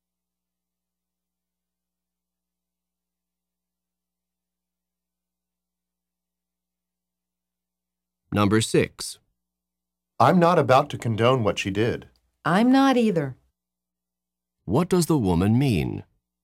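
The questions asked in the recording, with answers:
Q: What does the woman mean?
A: She also does not condone what she did.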